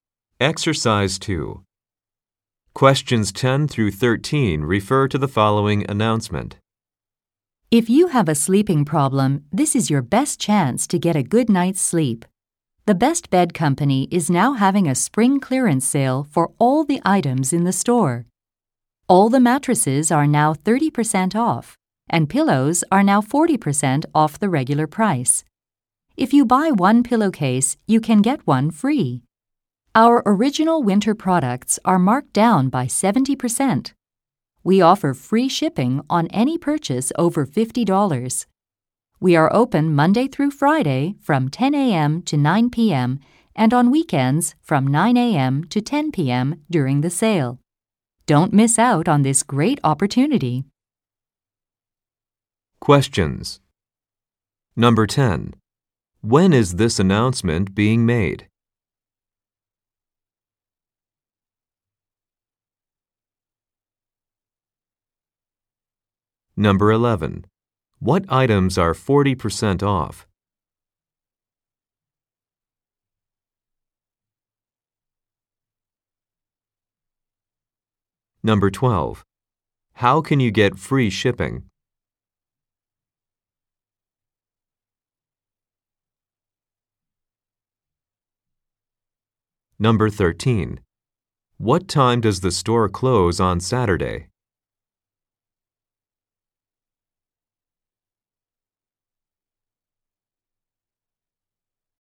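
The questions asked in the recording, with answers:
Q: When is this announcement being made?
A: In spring

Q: What items are 40% off?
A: Pillows

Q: How can you get free shipping?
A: By spending over $50

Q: What time does the store close on Saturday?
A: 10 p.m.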